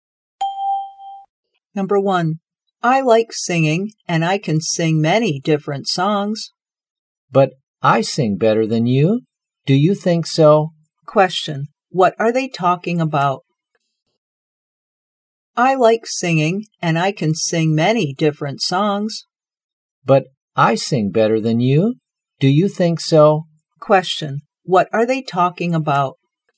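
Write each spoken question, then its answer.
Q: What are they talking about?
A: Singing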